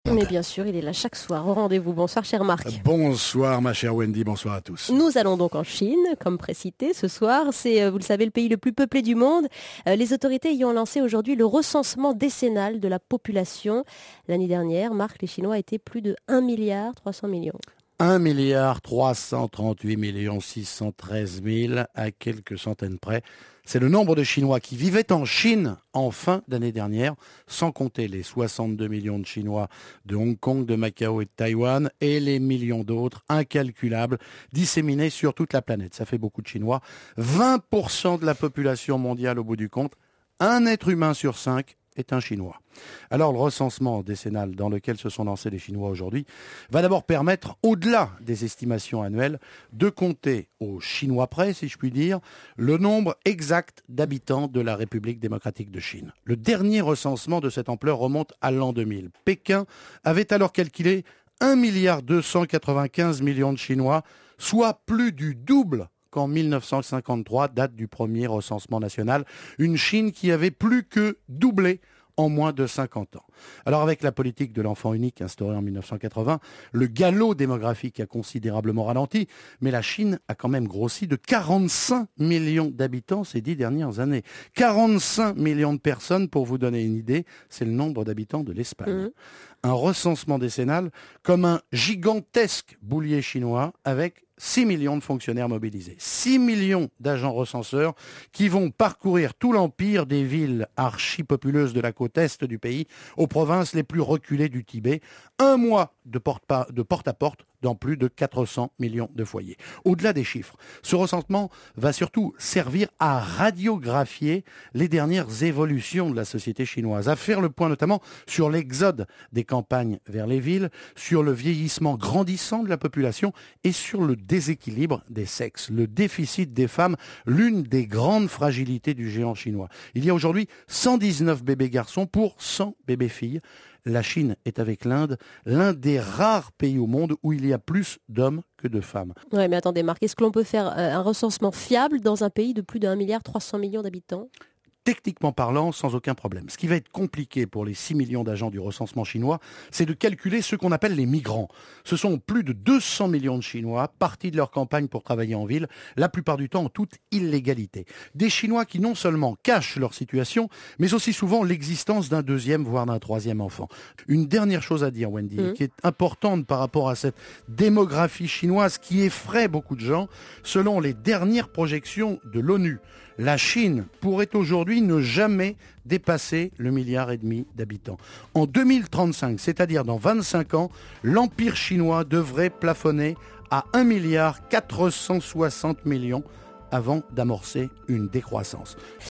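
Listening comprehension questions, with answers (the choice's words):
Lisez les questions puis écoutez le document sonore. Répondez aux questions en cochant la bonne réponse (X) ou en écrivant l'information demandée.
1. Ce document sonore concerne quel domaine ?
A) L'actualité internationale.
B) La diplomatie.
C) Les sciences.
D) La politique.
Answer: L'actualité internationale.

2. Quel est l'événement principal annoncé ?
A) Le fichage de la population chinoise.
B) L'encensement de la population chinoise.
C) Le comptage de la population chinoise.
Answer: Le comptage de la population chinoise.

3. Cet événement a lieu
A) tous les ans.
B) tous les 10 ans.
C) tous les 20 ans.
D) tous les 30 ans.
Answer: tous les 10 ans.

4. Un an avant l'émission, la population totale de la Chine comptait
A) 1 338 613 habitants.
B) 1 338 616 000 habitants.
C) 1 338 613 000 habitants.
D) 1 336 813 000 habitants.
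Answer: 1 338 613 000 habitants.

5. La population de Hong-Kong, Macao et Taïwan se monte à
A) 72 000 000 habitants.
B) 620 000 habitants.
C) 6 200 000 habitants.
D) 62 000 000 habitants.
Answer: 62 000 000 habitants.

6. Complétez : Que représente le nombre de Chinois dans la population mondiale ? (en %)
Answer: 20 %

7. En 2000, la Chine comptait 1 295 000 000 habitants.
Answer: Vrai

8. La population chinoise a triplé entre 1953 et 2000.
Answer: Faux

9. La politique de l'enfant unique existe depuis 1980.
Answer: Vrai

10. La population continue d'augmenter très rapidement.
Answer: Faux

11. L'augmentation du nombre d'habitants de la République populaire de Chine des dix dernières années équivaut à la population espagnole actuelle.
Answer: Vrai

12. Combien de fonctionnaires participent à cette opération ?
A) 6 000 000.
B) 16 000 000.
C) 10 000 000.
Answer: 6 000 000.

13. Cela se fera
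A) par courrier.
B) par internet.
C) en allant chez les gens.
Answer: en allant chez les gens.

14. Vrai ou faux ? Les Chinois sont tellement nombreux qu'il est techniquement impossible de connaitre la population chinoise de façon précise.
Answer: Faux

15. Vrai ou faux ? Le nombre de migrants chinois pose problème parce qu'on n'a pas toutes les informations sur la composition exacte du foyer.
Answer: Vrai

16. Selon des études, la population chinoise à partir de 2035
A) devrait se stabiliser.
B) devrait continuer d'augmenter.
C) devrait diminuer.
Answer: devrait diminuer.

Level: NIVO B2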